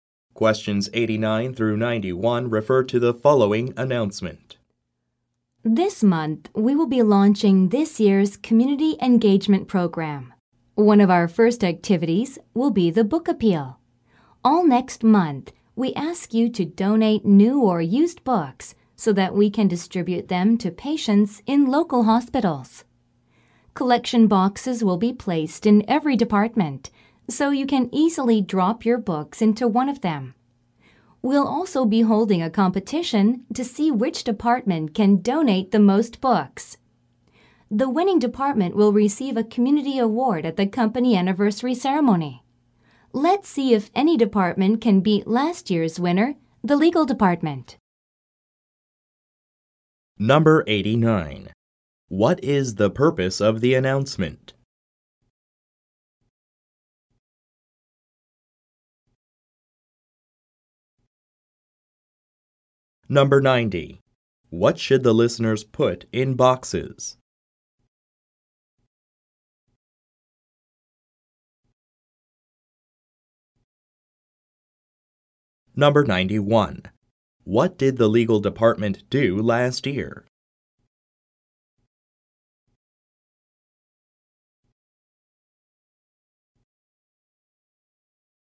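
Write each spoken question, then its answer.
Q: What is the purpose of the announcement?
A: To announce a book donation drive (community engagement program)

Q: What should the listeners put in boxes?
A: New or used books

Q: What did the legal department do last year?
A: Won the book donation competition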